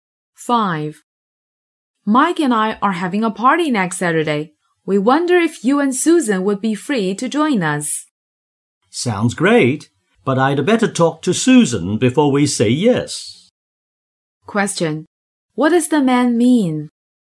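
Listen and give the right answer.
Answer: He must talk to Susan before accepting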